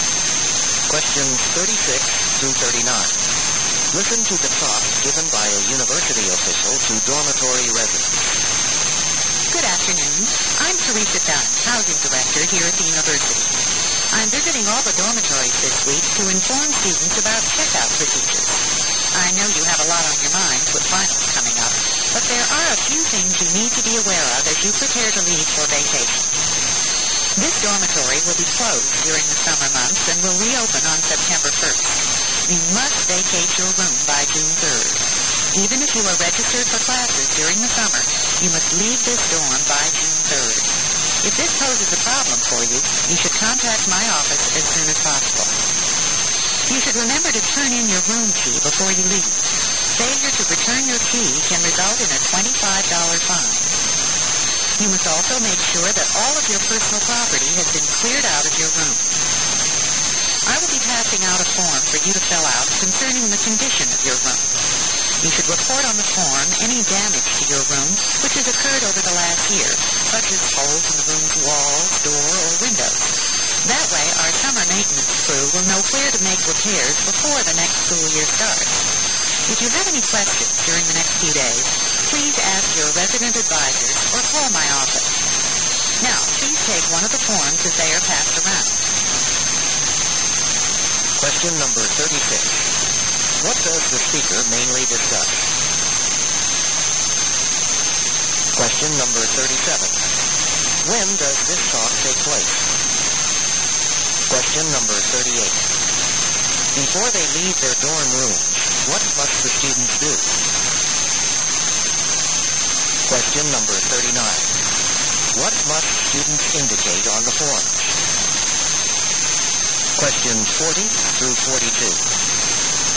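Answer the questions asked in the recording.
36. Dormitory checkout procedures
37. Near the end of the school year, before finals and summer vacation
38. Return their room key and clear out their belongings
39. Any damage to their room during the past year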